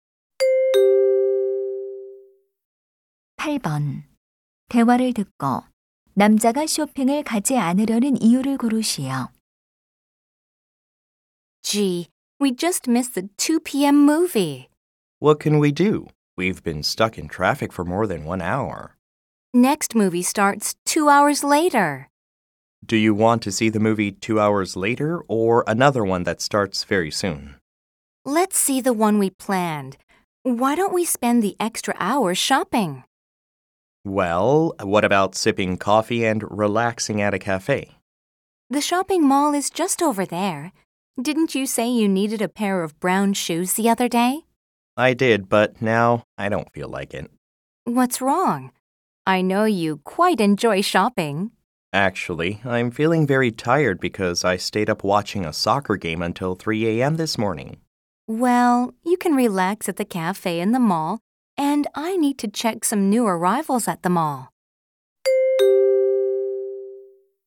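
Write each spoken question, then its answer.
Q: 대화를 듣고 남자가 쇼핑을 가지 않으려는 이유를 고르시오.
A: 새벽 3시까지 축구 경기를 보느라 피곤해서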